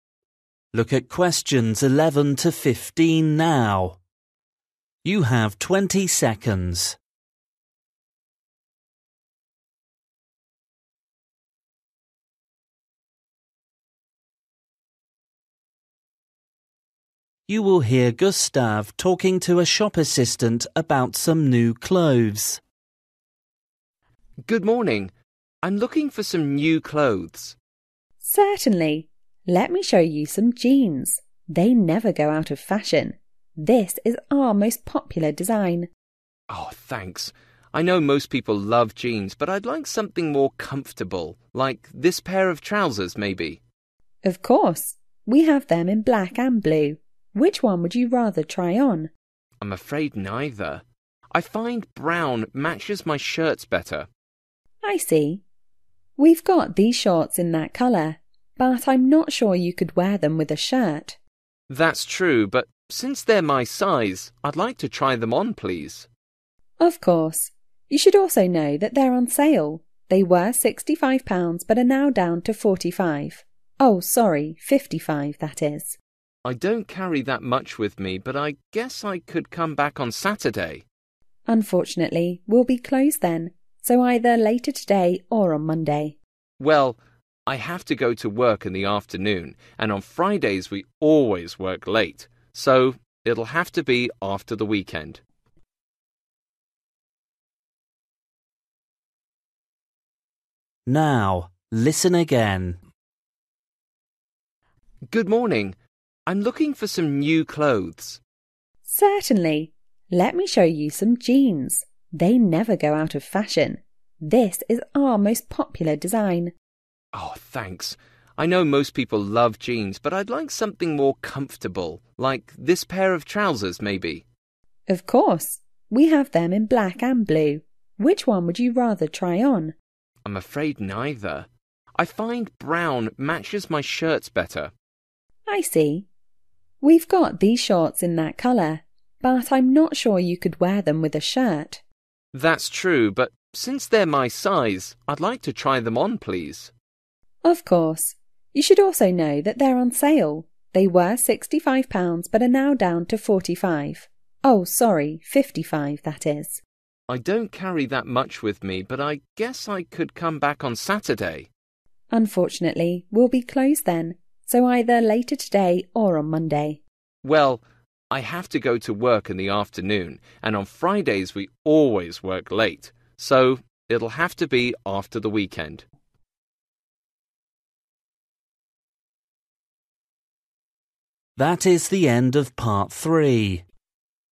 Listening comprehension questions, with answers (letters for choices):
For each question, choose the correct answer.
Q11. Gustav thinks jeans are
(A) uncomfortable.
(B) expensive.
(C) not fashionable.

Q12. What colour does Gustav prefer?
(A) black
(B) blue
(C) brown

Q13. The shop assistant says that the shorts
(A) don't match his shirts.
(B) won't fit Gustav.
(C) are not the right colour.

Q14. How much will Gustav pay?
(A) £65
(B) £55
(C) £45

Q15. When will Gustav come back to the shop?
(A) on Friday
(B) on Saturday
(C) on Monday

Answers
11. A
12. C
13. A
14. B
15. C

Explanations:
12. I find brown matches my shirts better.
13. We've got these shorts in that colour. But I'm not sure you could wear them with a shirt.
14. Oh sorry, 55 that is.

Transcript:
M: Good morning! I'm looking for some new clothes.
F: Certainly. Let me show you some jeans. They never go out of fashion. This is our most popular design.
M: Oh, thanks. (11) I know most people love jeans but I'd like something more comfortable, like this pair of trousers, maybe?
F: Of course. We have them in black and blue. Which one would you rather try on?
M: I'm afraid neither. (12) I find brown matches my shirts better.
F: I see. (13) We've got these shorts in that colour. But I'm not sure you could wear them with a shirt.
M: That's true but since they're my size I'd like to try them on, please.
F: Of course. You should also know that they're on sale. They were 65 pounds but are now down to 45. (14) Oh sorry, 55 that is.
M: I don't carry that much with me but I guess I could come back on Saturday.
F: Unfortunately we'll be closed then. So either later today or on Monday.
M: Well, I have to go to work in the afternoon and on Fridays we always work late, (15) so it'll have to be after the weekend.

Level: KET (A2)